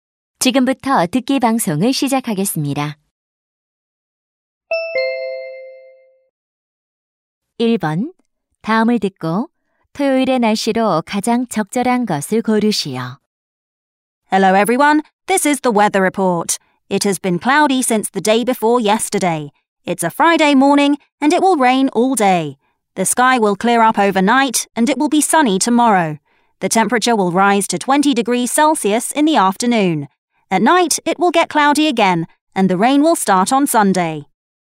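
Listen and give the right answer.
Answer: 맑음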